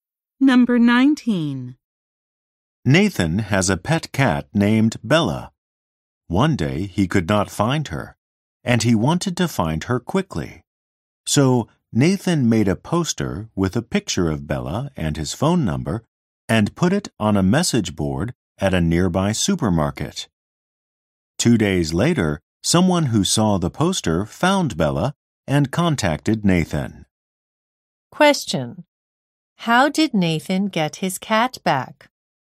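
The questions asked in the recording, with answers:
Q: How did Nathan get his cat back?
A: Someone saw his poster at the supermarket and found her.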